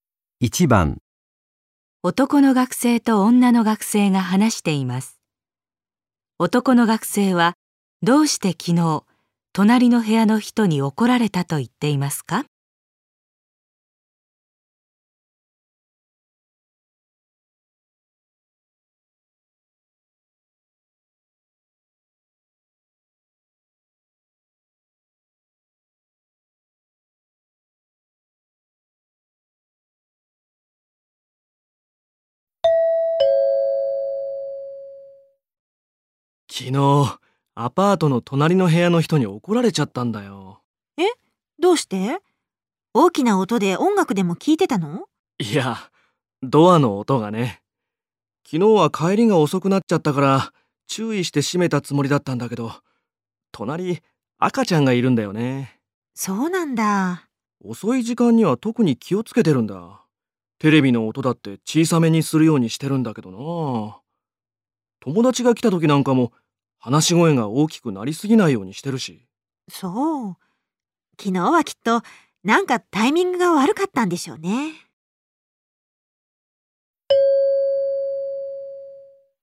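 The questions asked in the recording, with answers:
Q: 男の学生はどうして昨日隣の部屋の人に怒られたと言っていますか?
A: ドアの音がうるさかったから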